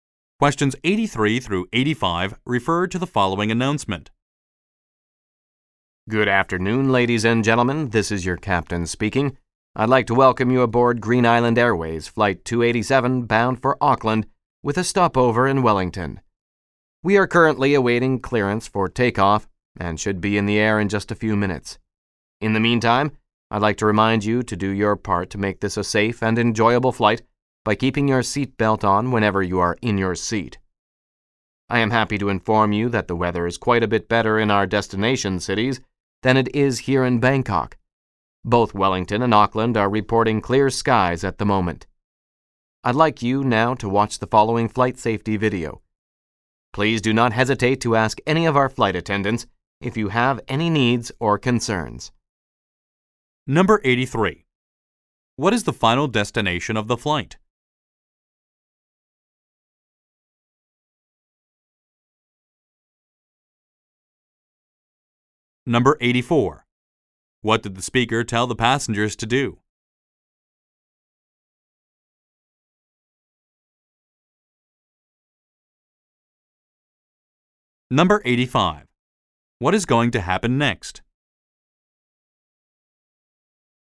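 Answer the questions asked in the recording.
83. Auckland
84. Keep their seat belts on while seated
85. A flight safety video will be shown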